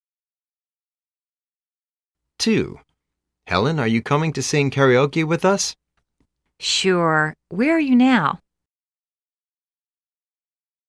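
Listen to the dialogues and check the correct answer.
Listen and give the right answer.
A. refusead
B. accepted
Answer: B. accepted

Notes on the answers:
A:Helen,are you coming to sing karaoke with us? B:Sure,where are you now?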